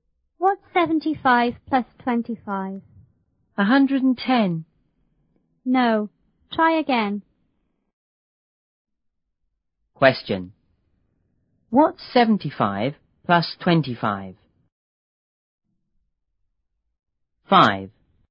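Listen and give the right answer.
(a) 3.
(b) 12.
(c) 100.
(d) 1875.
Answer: (c) 100.

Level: 初中英语广州版1B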